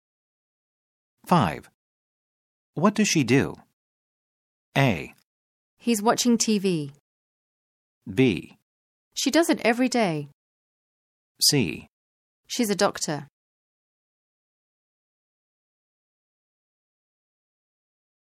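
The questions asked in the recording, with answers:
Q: What does she do?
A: C: She's a doctor.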